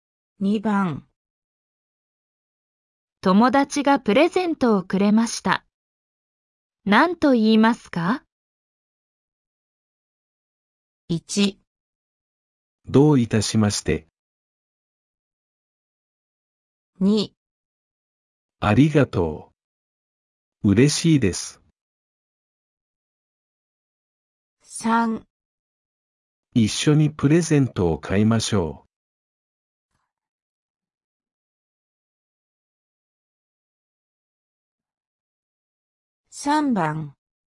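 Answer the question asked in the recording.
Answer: 2

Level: N5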